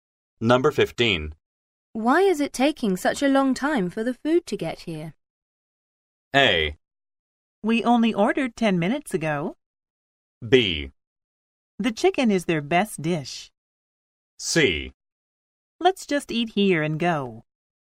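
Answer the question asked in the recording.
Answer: A: We only ordered 10 minutes ago.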